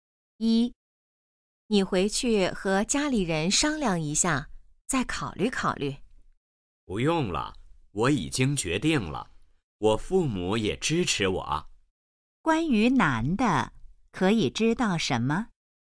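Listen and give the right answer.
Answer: 他已经做了决定,父母也支持他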